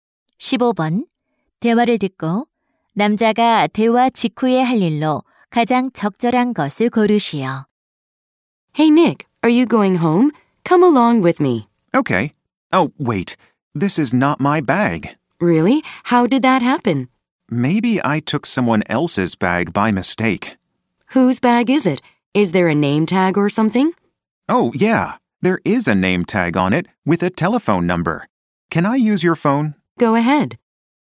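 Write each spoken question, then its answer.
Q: 대화를 듣고 남자가 대화 직후에 할 일로 가장 적절한 것을 고르시오.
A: 가방 주인에게 전화하기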